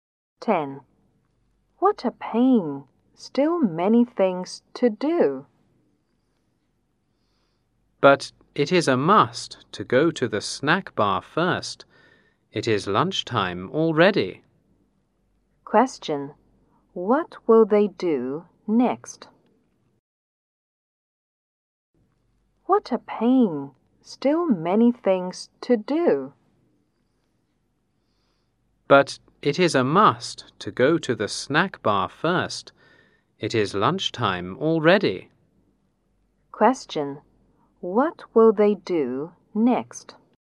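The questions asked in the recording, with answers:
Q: What will they do next?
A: Go to the snack bar for lunch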